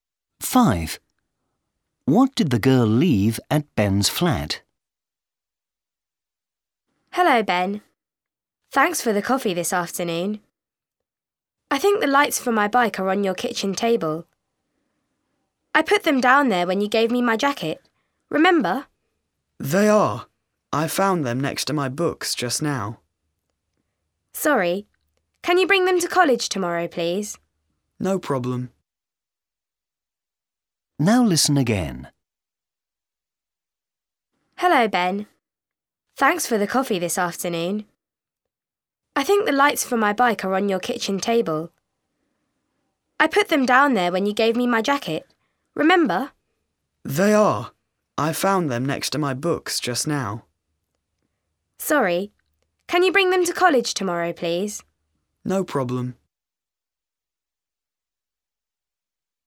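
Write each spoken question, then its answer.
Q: What did the girl leave at Ben's flat?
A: the lights for her bike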